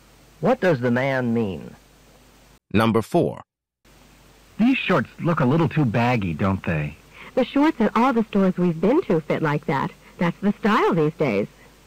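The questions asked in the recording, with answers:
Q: What does the woman imply?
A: Baggy shorts are the current style, so they fit as they should.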